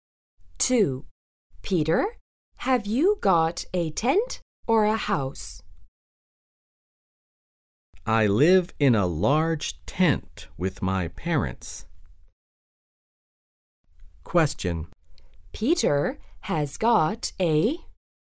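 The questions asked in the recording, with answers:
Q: Peter has got a...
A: a tent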